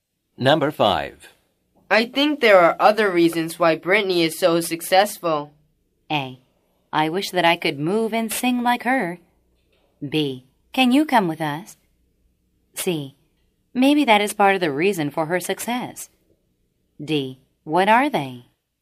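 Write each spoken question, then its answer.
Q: I think there are other reasons why Britney is so successful.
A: D: What are they?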